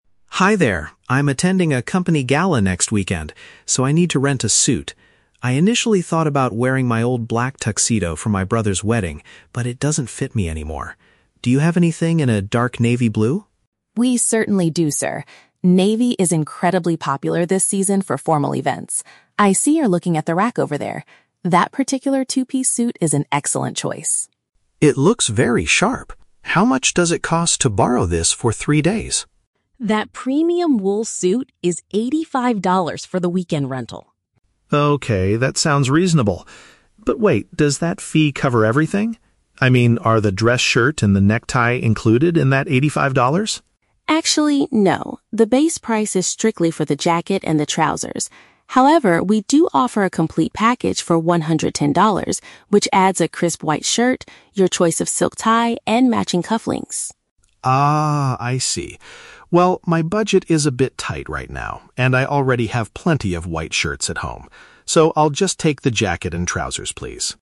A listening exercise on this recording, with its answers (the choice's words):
Listen to the conversation between a customer and a rental shop assistant. For each question, choose the correct answer (A, B, or C).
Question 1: Why is the man visiting the rental shop today?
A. He needs an outfit for a business-related party.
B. He is preparing to attend his brother's wedding.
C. He wants to buy a brand new black tuxedo.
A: He needs an outfit for a business-related party.

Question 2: What does the customer want to know about the $85 fee?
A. Whether it includes a special discount for the weekend.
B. If it covers the cost of additional clothing and accessories.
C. Why the premium wool material is priced so high.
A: If it covers the cost of additional clothing and accessories.

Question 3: What does the customer ultimately decide to do?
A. Pay for the complete package to save time.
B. Rent only the basic suit because he owns the other items.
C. Look for a cheaper suit at another rental store.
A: Rent only the basic suit because he owns the other items.

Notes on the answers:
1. The customer says he is attending a "company gala," which is paraphrased in option A as a "business-related party." Option B is a trap; his "brother's wedding" is mentioned, but that was a past event where he wore his old tuxedo. Option C is a trap because he wants to rent a navy suit, not buy a black tuxedo.
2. The customer asks, "does that fee cover everything? I mean, are the dress shirt and the necktie included...". The shirt and tie are paraphrased as "additional clothing and accessories." Option A is a trap; the "weekend" rental is mentioned, but he does not ask for a discount. Option C is plausible but never mentioned in the audio.
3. The customer decides to just take the "jacket and trousers" (the basic suit) because his budget is tight and he says, "I already have plenty of white shirts at home" (he owns the other items). Option A is the trap representing the $110 package, which he explicitly rejects. Option C is a plausible action for someone with a tight budget, but it is not what he does.

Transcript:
Customer: Hi there, I'm attending a company gala next weekend, so I need to rent a suit. I initially thought about wearing my old black tuxedo from my brother's wedding, but it doesn't fit me anymore. Do you have anything in a dark navy blue?
Assistant: We certainly do, sir. Navy is incredibly popular this season for formal events. I see you're looking at the rack over there. That particular two-piece suit is an excellent choice.
Customer: It looks very sharp. How much does it cost to borrow this for three days?
Assistant: That premium wool suit is $85 for the weekend rental.
Customer: Okay, that sounds reasonable. But wait, does that fee cover everything? I mean, are the dress shirt and the necktie included in that $85?
Assistant: Actually, no. The base price is strictly for the jacket and the trousers. However, we do offer a complete package for $110, which adds a crisp white shirt, your choice of silk tie, and matching cufflinks.
Customer: Ah, I see. Well, my budget is a bit tight right now, and I already have plenty of white shirts at home. So, I'll just take the jacket and trousers, please.